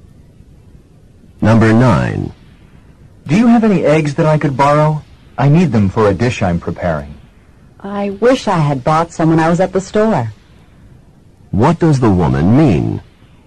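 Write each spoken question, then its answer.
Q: What does the woman mean?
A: She has no eggs.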